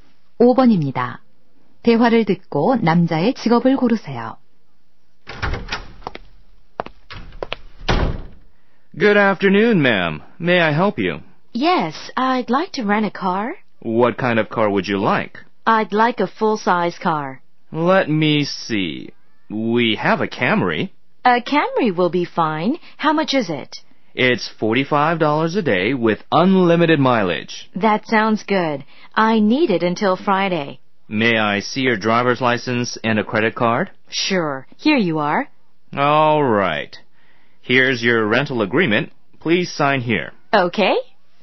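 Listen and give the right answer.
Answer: 렌터카 회사 직원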